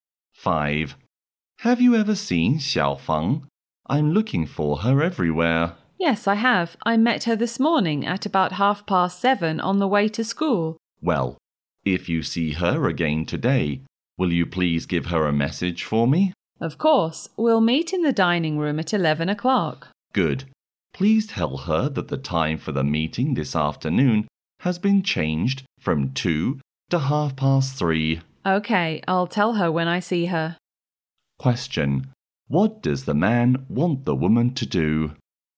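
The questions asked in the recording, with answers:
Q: What does the man want the woman to do?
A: Tell Xiaofeng the meeting time has changed from 2 to 3:30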